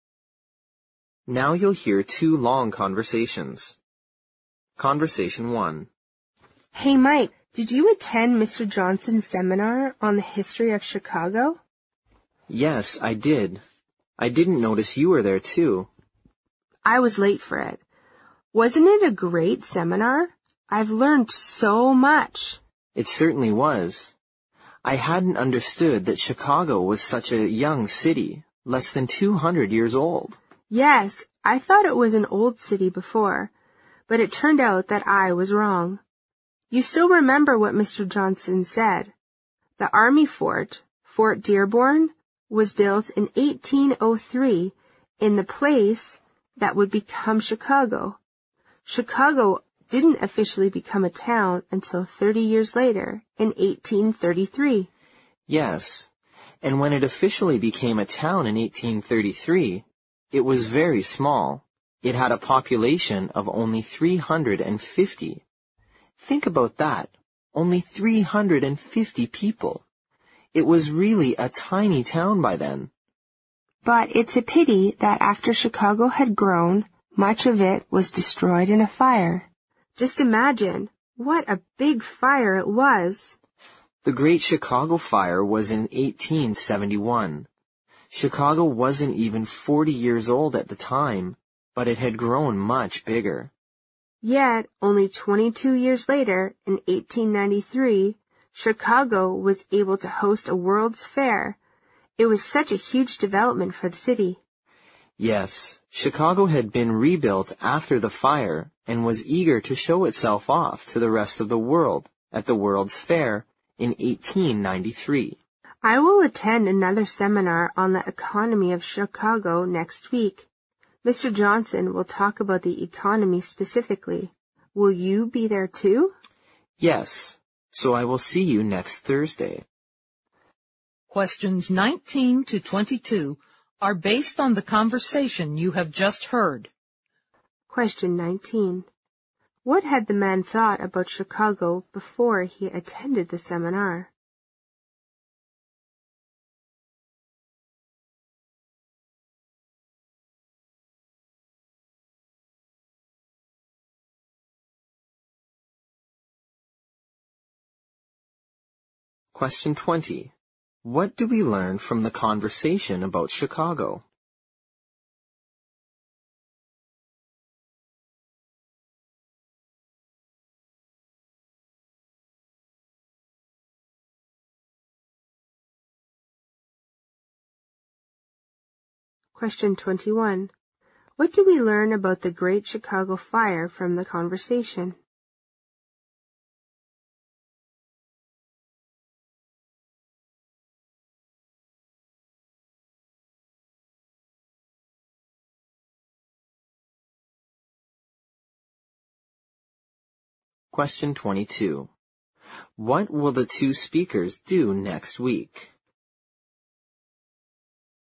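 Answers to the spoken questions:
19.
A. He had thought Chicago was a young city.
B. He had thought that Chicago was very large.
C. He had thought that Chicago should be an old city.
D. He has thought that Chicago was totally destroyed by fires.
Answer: C. He had thought that Chicago should be an old city.
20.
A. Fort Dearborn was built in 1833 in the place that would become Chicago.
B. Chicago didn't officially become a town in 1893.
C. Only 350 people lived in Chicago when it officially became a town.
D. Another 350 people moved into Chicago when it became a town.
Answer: C. Only 350 people lived in Chicago when it officially became a town.
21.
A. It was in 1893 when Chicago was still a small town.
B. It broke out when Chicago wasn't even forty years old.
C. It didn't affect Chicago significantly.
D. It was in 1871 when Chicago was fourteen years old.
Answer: B. It broke out when Chicago wasn't even forty years old.
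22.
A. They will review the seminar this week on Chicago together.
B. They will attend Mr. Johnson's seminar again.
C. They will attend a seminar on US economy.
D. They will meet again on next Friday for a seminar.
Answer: B. They will attend Mr. Johnson's seminar again.

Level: 六级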